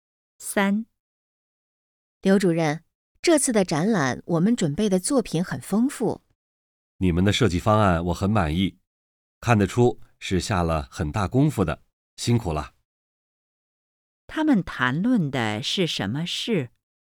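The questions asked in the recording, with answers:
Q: 他们谈论的是什么事?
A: 展览的设计方案和准备的作品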